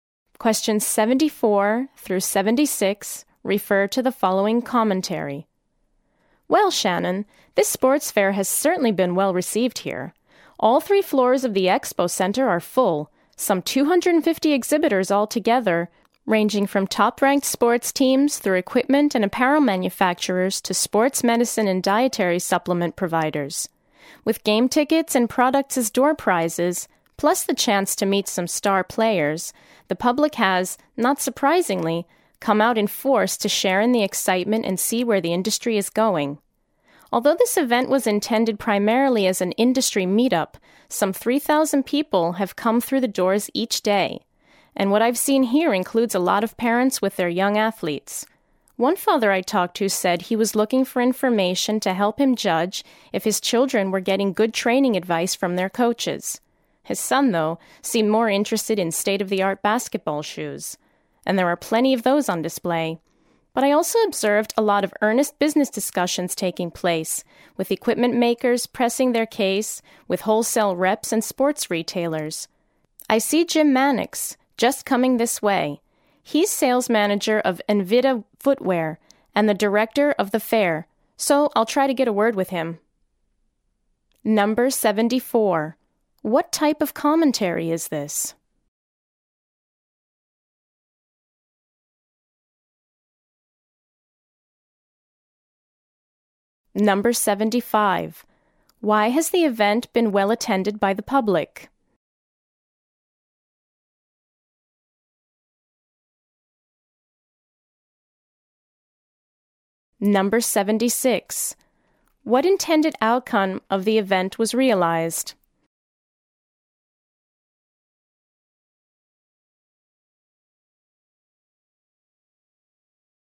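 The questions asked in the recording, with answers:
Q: Why has the event been well attended by the public?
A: Door prizes and the chance to meet star players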